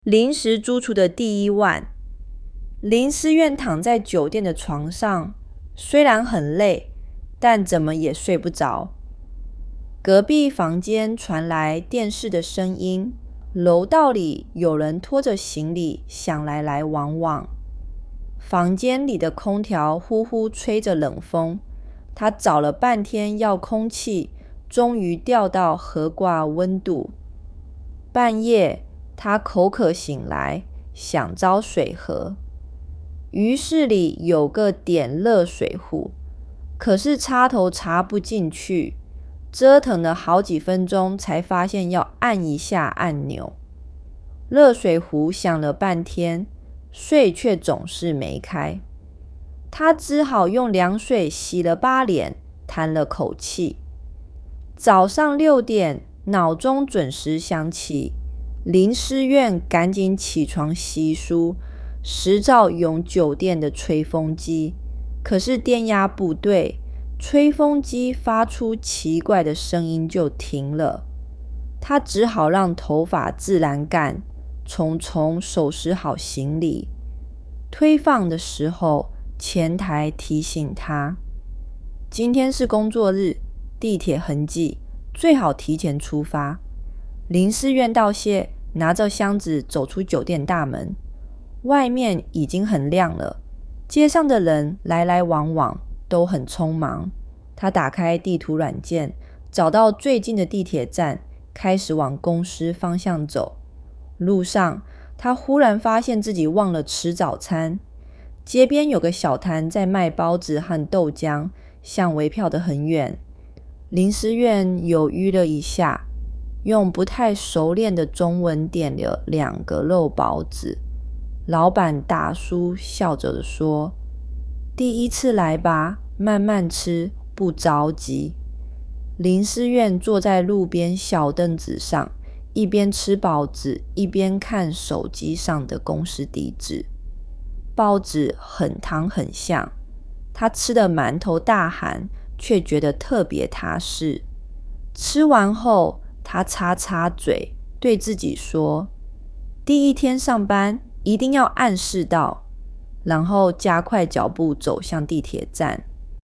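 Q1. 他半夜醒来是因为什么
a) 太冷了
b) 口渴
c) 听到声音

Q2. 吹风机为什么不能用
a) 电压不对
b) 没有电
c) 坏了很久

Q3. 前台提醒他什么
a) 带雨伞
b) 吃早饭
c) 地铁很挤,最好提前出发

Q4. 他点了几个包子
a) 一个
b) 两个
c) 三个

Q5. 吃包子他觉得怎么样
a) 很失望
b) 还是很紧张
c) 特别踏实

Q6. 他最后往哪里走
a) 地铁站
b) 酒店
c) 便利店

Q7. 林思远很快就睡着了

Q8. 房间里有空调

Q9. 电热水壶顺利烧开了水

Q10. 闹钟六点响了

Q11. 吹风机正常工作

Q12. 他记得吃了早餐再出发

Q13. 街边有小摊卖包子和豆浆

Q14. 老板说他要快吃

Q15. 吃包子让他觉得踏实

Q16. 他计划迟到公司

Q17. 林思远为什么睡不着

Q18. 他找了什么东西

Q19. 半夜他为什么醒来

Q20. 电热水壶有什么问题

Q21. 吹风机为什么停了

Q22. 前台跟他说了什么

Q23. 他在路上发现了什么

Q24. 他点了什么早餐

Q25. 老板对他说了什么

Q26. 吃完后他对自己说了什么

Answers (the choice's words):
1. 口渴
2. 电压不对
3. 地铁很挤,最好提前出发
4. 两个
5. 特别踏实
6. 地铁站
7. 错
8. 对
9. 错
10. 对
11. 错
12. 错
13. 对
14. 错
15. 对
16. 错
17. 隔壁有电视声音,楼道里有人拖行李箱,空调吹冷风
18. 遥控器
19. 口渴
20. 插头插不进去,水总是没开
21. 电压不对
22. 今天是工作日,地铁很挤,最好提前出发
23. 他忘了吃早餐
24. 两个肉包子
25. 第一次来吧?慢慢吃,不着急
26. 第一天上班,一定要按时到

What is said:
林思远躺在酒店的床上,虽然很累,但怎么也睡不着。隔壁房间传来电视的声音,楼道里有人拖着行李箱来来往往。房间里的空调呼呼吹着冷风,他找了半天遥控器,终于调到合适温度。
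半夜,他口渴醒来,想找水喝。浴室里有个电热水壶,可是插头插不进去,折腾了好几分钟才发现要按一下按钮。热水壶响了半天,水却总是没开。他只好用凉水洗了把脸,叹了口气。
早上六点,闹钟准时响起。林思远赶紧起床洗漱,试着用酒店的吹风机,可是电压不对,吹风机发出奇怪的声音就停了。他只好让头发自然干,匆匆收拾好行李。
退房的时候,前台提醒他:"今天是工作日,地铁很挤,最好提前出发。"林思远道谢,拿着箱子走出酒店大门。外面已经很亮了,街上的人来来往往,都很匆忙。他打开地图软件,找到最近的地铁站,开始往公司方向走。
路上,他忽然发现自己忘了吃早餐。街边有个小摊在卖包子豆浆,香味飘得很远。林思远犹豫了一下,用不太熟练的中文点了两个肉包子。老板大叔笑着说:"第一次来吧?慢慢吃,不着急。
林思远坐在路边小凳子上,一边吃包子一边看手机上的公司地址。包子很烫很香,他吃得满头大汗,却觉得特别踏实。吃完后,他擦擦嘴,对自己说:"第一天上班,一定要按时到!"然后加快脚步走向地铁站。

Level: HSK4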